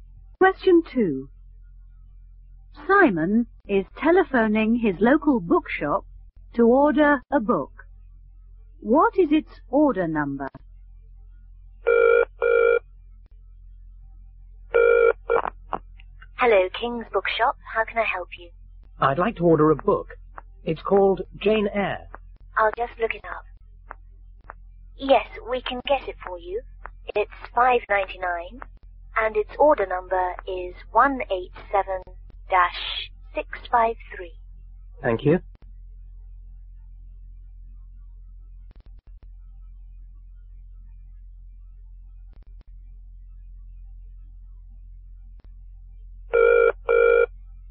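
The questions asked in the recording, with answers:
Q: What is its order number?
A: 187-653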